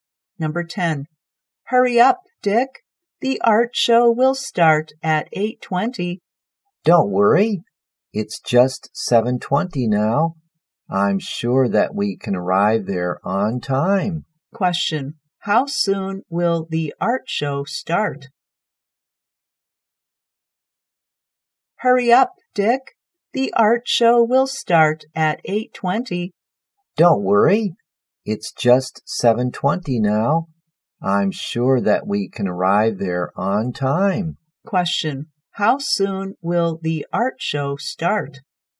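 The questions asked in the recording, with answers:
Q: Question. How soon will the art show start?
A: In one hour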